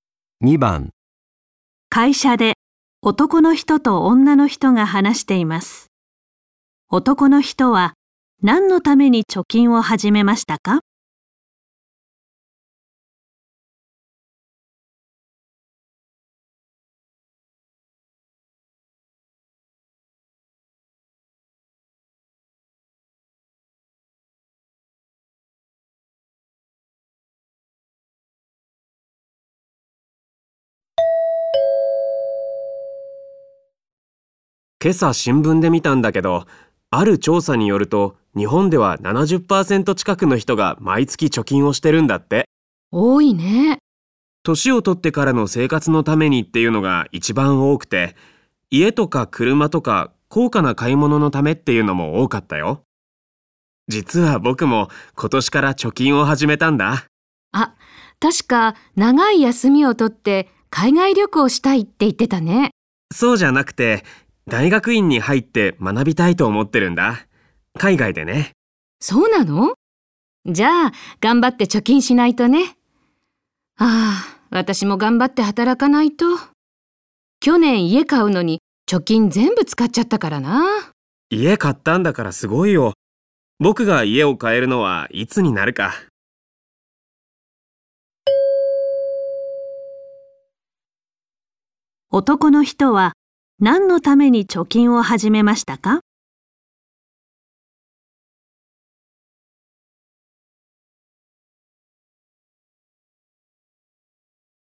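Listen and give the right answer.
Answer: 海外の大学院で学ぶため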